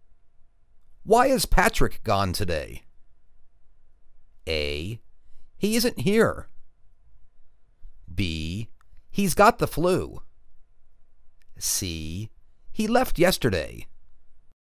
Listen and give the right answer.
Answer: He's got the flu.